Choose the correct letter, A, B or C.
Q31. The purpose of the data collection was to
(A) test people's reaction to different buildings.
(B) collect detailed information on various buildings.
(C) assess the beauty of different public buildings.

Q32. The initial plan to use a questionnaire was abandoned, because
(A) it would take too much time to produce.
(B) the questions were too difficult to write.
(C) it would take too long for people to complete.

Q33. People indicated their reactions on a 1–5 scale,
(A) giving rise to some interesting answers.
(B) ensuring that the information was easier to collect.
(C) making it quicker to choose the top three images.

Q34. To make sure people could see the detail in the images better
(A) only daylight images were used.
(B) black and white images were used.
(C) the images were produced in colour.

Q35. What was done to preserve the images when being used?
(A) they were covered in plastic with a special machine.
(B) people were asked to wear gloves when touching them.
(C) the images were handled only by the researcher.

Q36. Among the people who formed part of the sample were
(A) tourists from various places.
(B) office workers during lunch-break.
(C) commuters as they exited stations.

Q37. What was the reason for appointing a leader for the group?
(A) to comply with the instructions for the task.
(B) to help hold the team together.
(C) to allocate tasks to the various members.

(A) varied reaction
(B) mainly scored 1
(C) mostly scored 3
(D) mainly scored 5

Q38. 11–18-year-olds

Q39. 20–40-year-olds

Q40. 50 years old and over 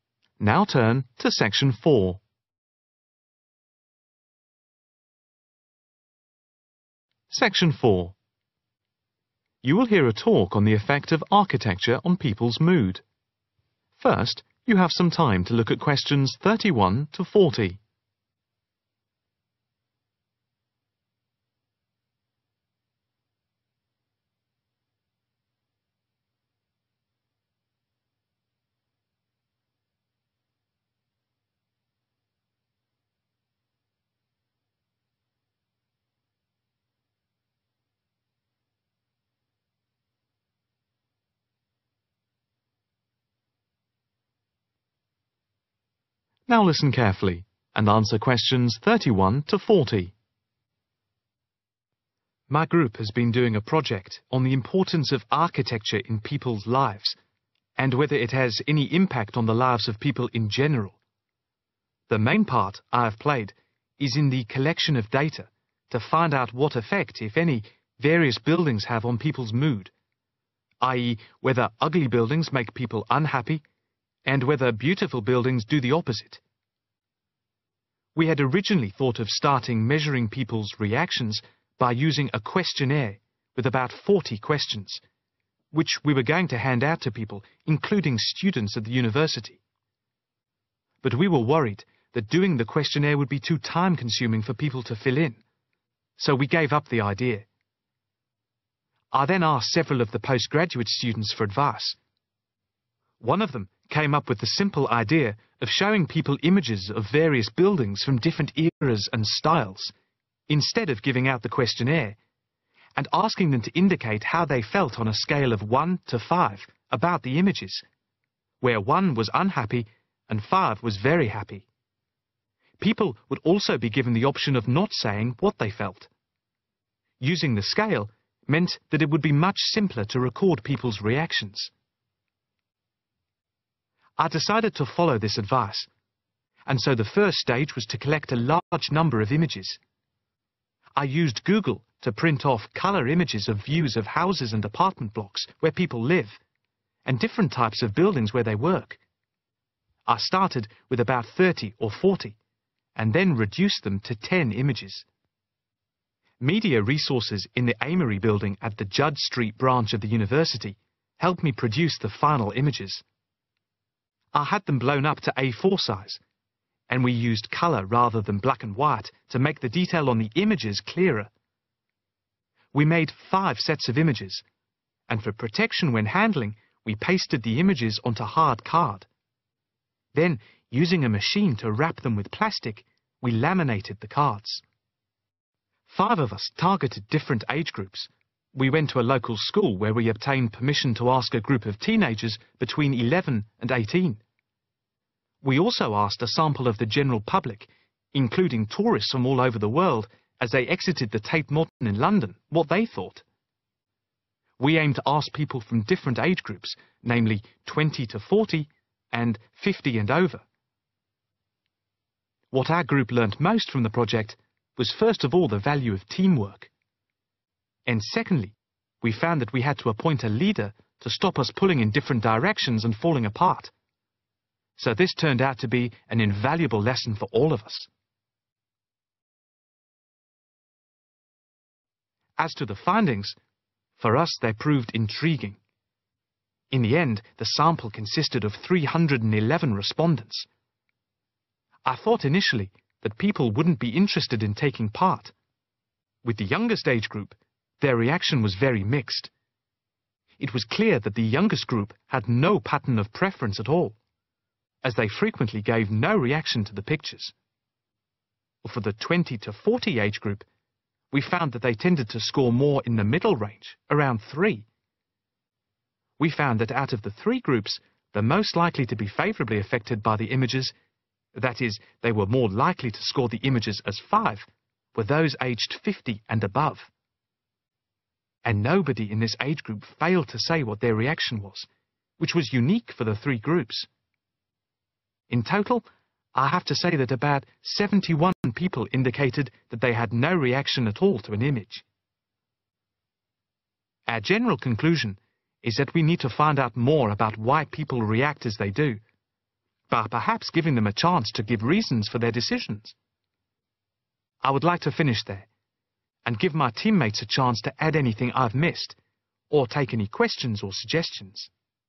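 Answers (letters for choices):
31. A
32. C
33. B
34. C
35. A
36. A
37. B
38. A
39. C
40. D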